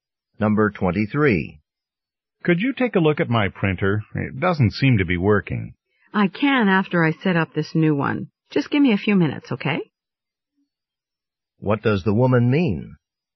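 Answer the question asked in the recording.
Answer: She will look at the printer in a few minutes, after she sets up the new one.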